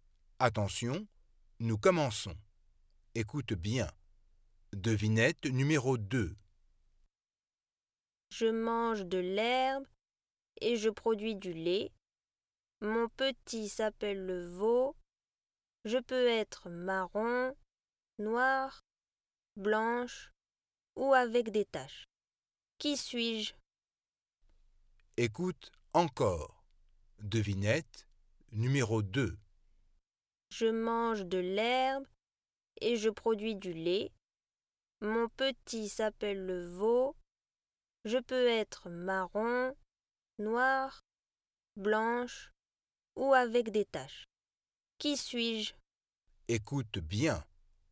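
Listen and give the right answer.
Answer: une vache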